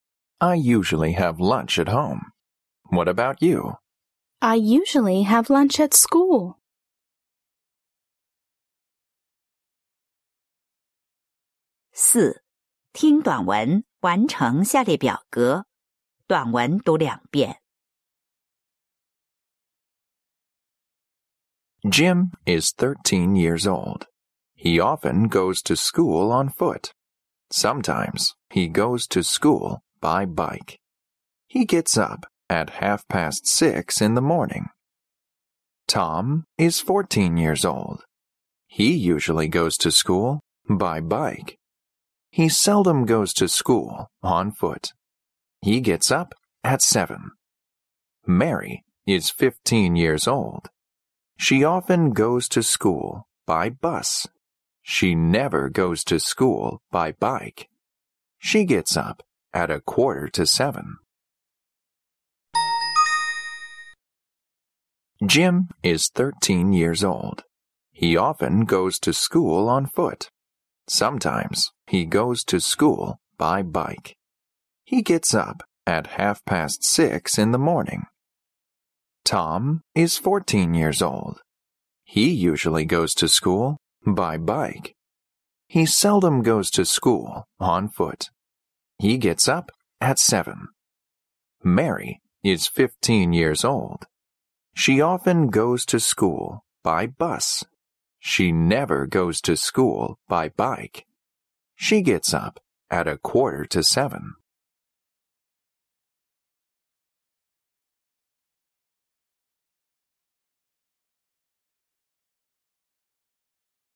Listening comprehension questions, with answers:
IV. 听短文,完成下列表格。短文读两遍。(5分)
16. 16.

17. 17.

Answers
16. On foot
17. At 6:30a.m.

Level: 七年级